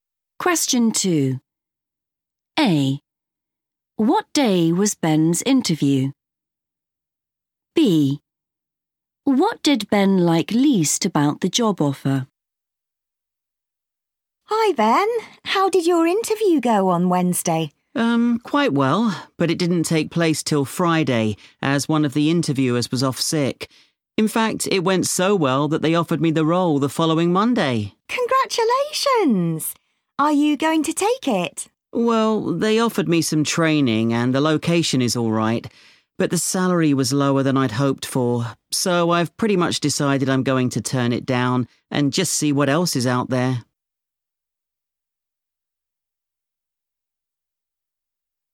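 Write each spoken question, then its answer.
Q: What day was Ben's interview?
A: Friday

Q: What did Ben like least about the job offer?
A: the salary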